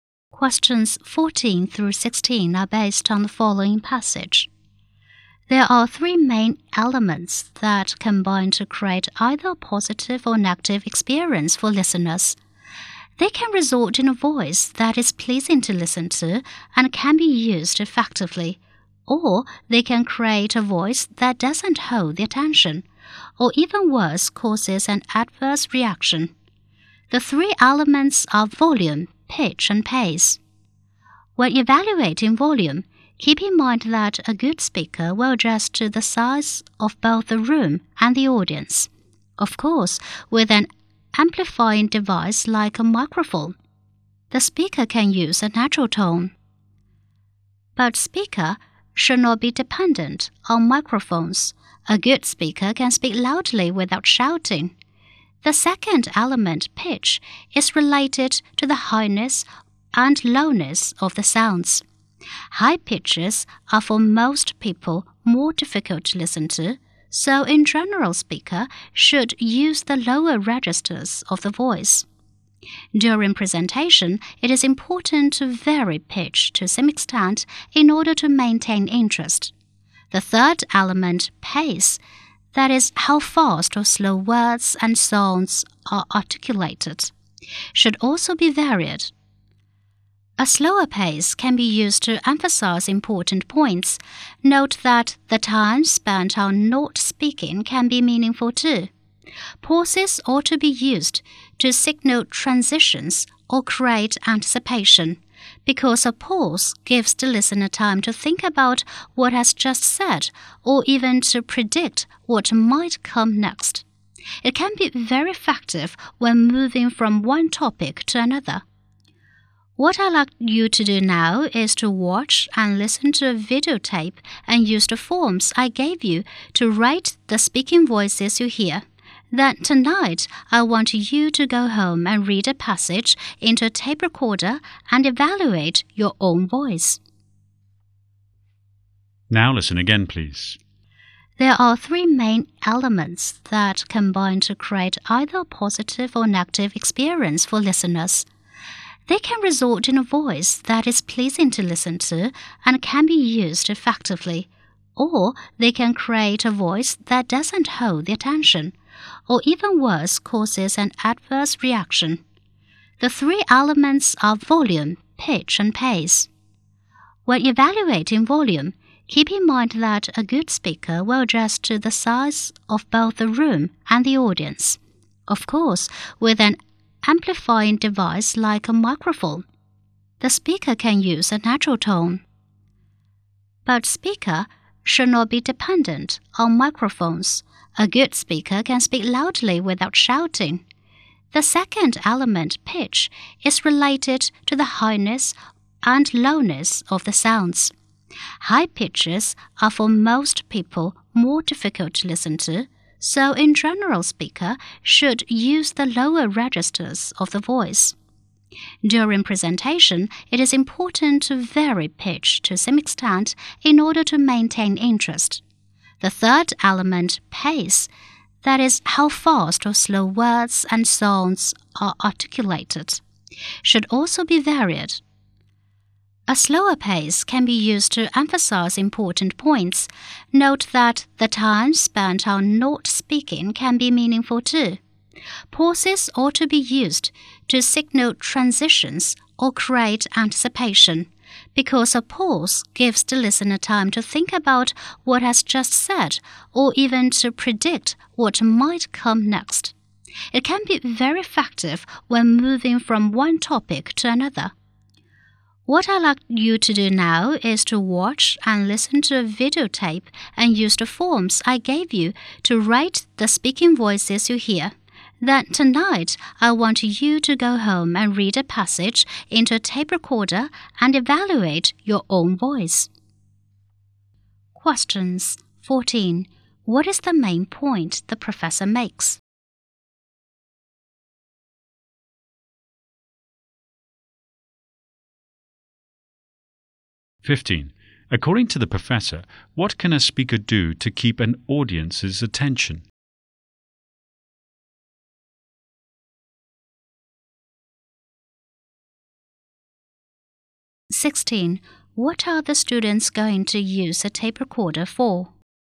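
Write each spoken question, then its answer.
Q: What is the main point the professor makes?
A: Volume, pitch and pace make an effective speaking voice

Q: According to the professor, what can a speaker do to keep an audience's attention?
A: Vary the pitch

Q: What are the students going to use a tape recorder for?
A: To record themselves reading and evaluate their own voices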